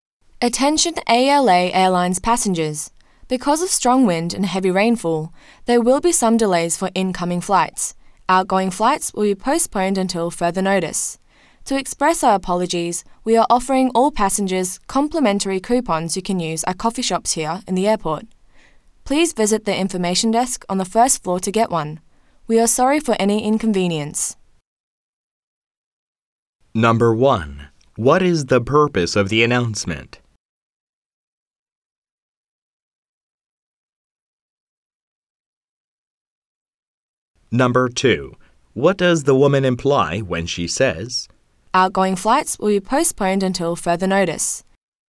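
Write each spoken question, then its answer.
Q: What is the purpose of the announcement?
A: To inform passengers about flight delays caused by bad weather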